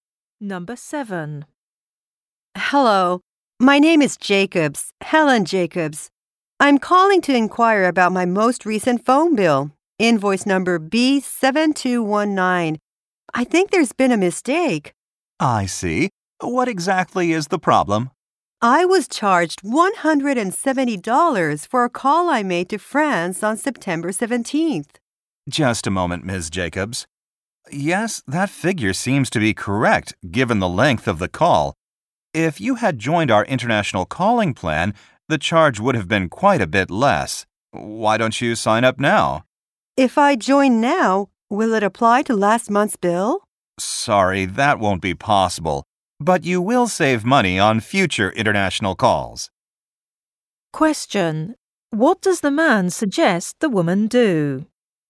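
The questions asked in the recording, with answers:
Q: What does the man suggest the woman do?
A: Sign up for the international calling plan.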